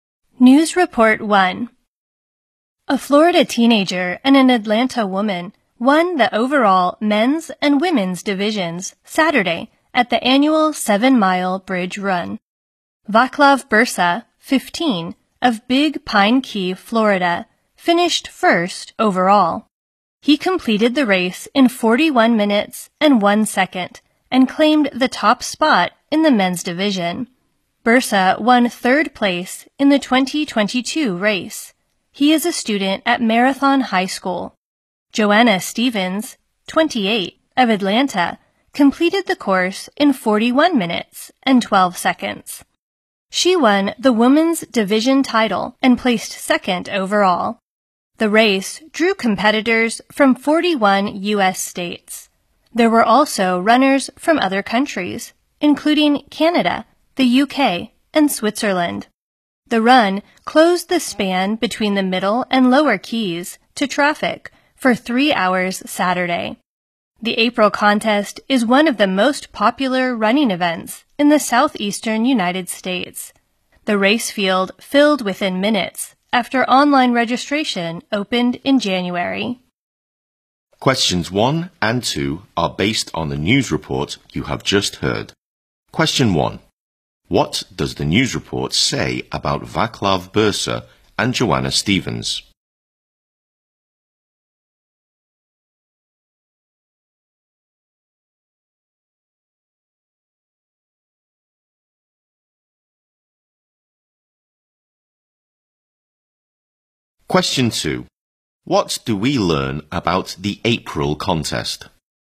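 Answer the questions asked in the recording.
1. They won the men's and women's divisions of the 7-mile bridge run
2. It is one of the most popular running events in the southeastern US; its field filled within minutes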